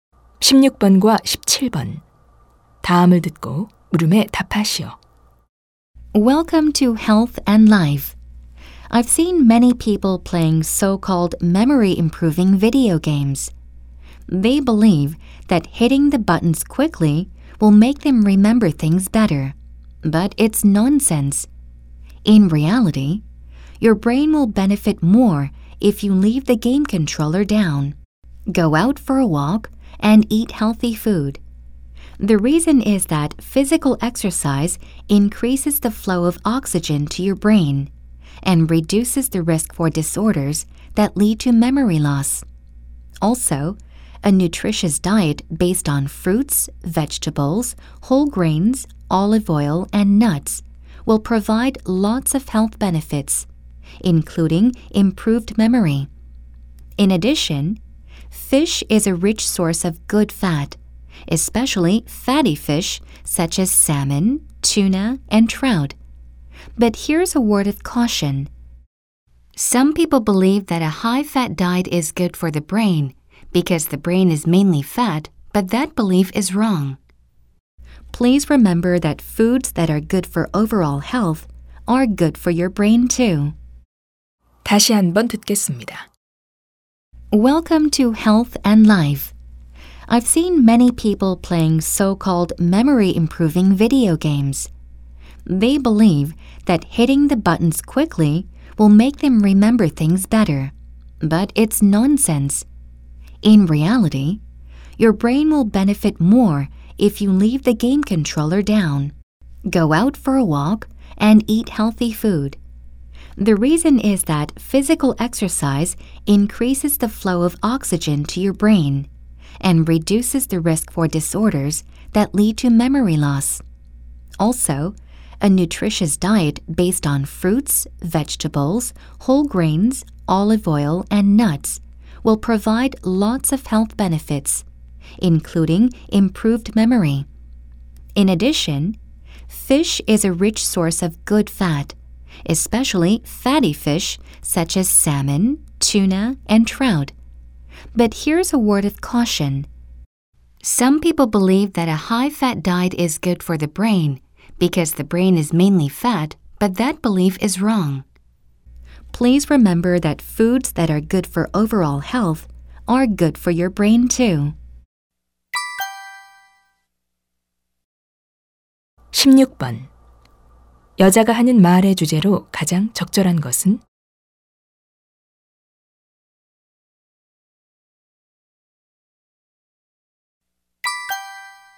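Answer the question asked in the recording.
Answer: 기억력 향상을 위해서는 운동과 건강한 식단이 좋다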